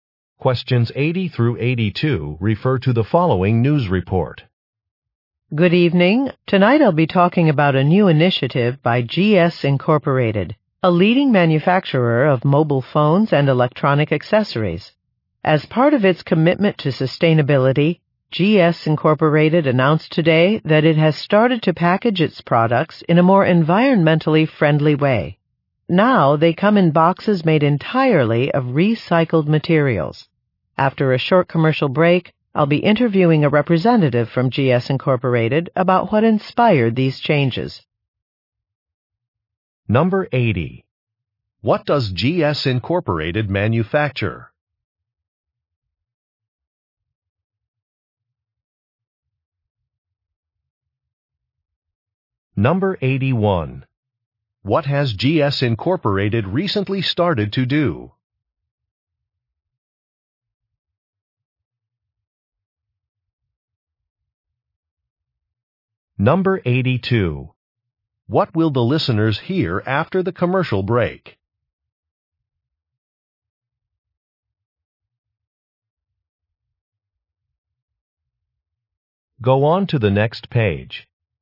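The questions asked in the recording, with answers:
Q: What does GS Incorporated manufacture?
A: Mobile phones and electronic accessories

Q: What has GS Incorporated recently started to do?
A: Package products in boxes made of recycled materials

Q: What will the listeners hear after the commercial break?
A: An interview with a GS Incorporated representative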